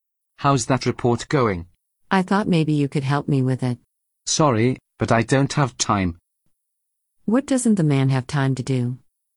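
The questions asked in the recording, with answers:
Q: What doesn't the man have time to do?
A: Help with the report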